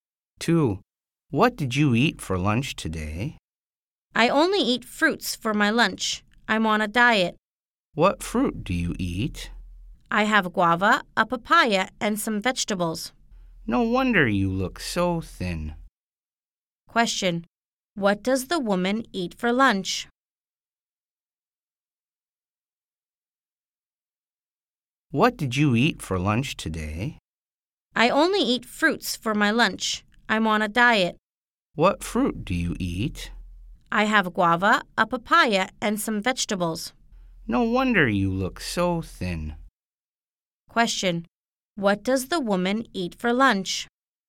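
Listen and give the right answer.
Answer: Fruits: guava, a papaya, and some vegetables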